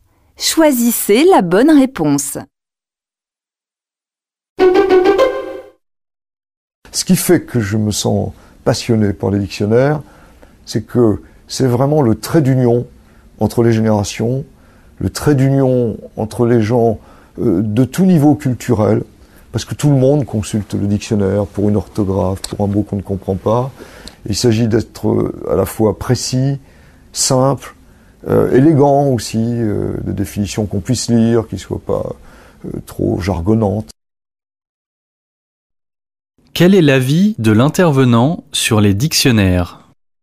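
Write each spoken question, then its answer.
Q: Quel est l'avis de l'intervenant sur les dictionnaires ?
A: Il en est passionné : ils font le lien entre les générations et entre les gens de tout niveau culturel.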